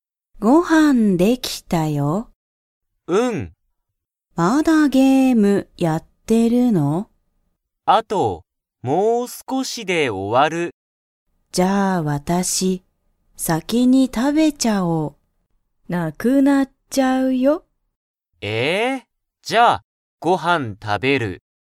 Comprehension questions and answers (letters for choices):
Comprehension Quiz (Skip if you don't understand the conversation yet)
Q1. ユウキはご飯(はん)を食(た)べますか?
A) はい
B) いいえ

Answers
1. A